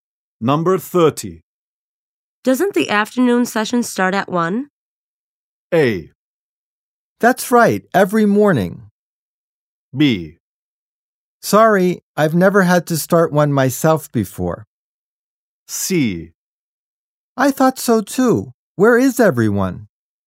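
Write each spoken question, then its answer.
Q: Doesn't the afternoon session start at 1?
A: C: I thought so too. Where is everyone?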